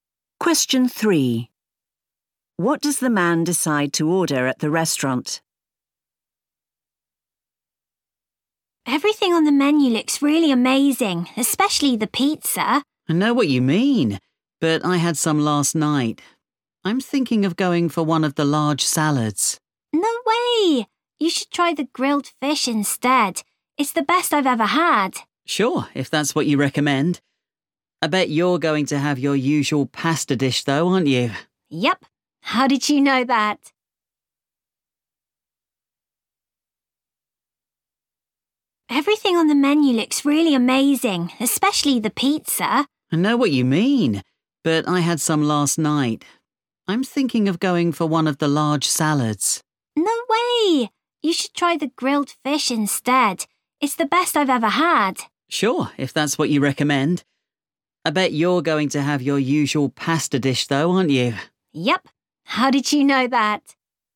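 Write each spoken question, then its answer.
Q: What does the man decide to order at the restaurant?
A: The grilled fish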